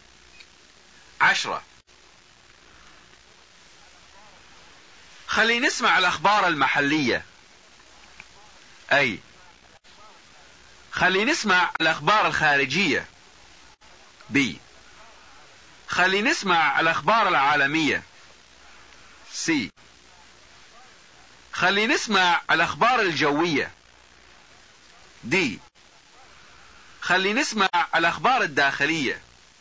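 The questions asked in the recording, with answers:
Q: عشرة خلي نسمع الأخبار المحلية.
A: D: خلي نسمع الأخبار الداخلية.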